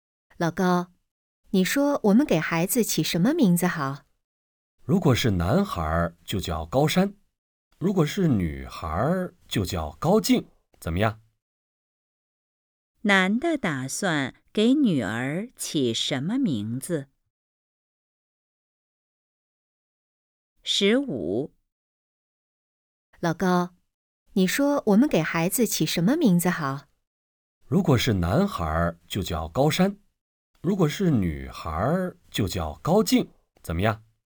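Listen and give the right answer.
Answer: 高静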